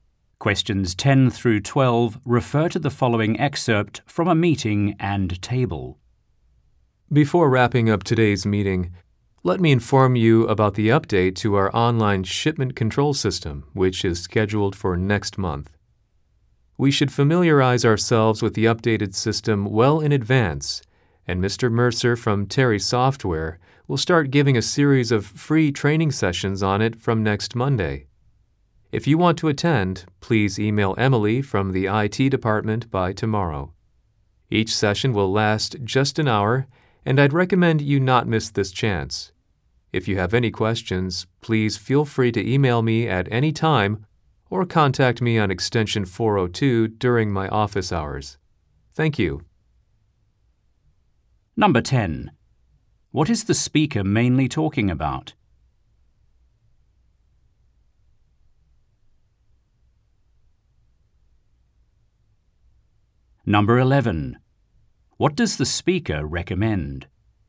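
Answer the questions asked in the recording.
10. Free training sessions on an updated online shipment control system
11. Attending the training sessions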